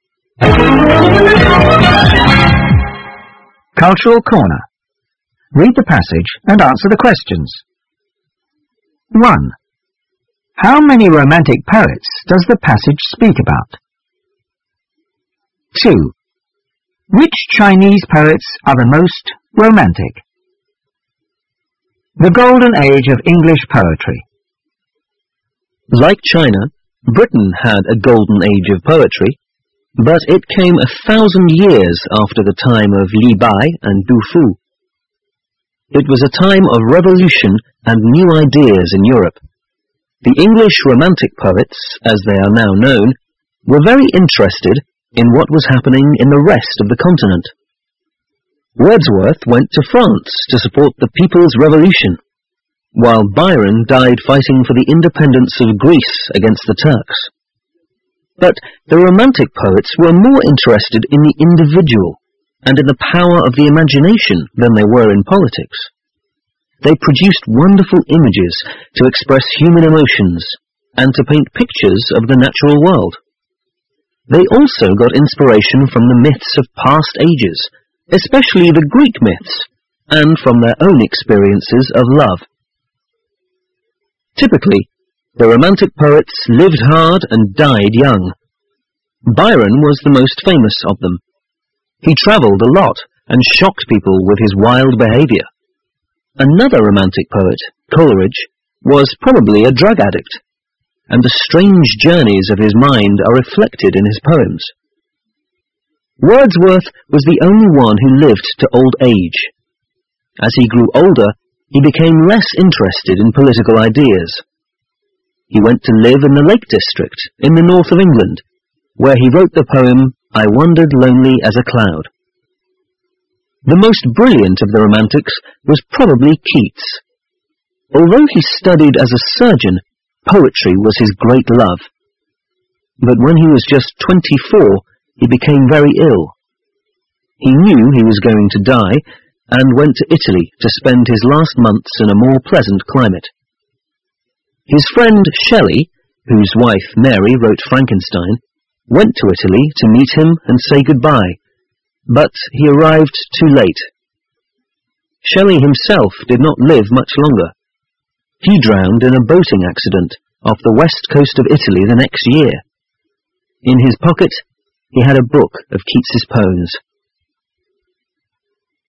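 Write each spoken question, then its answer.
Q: How many romantic poets does the passage speak about?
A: Five (Wordsworth, Byron, Coleridge, Keats and Shelley)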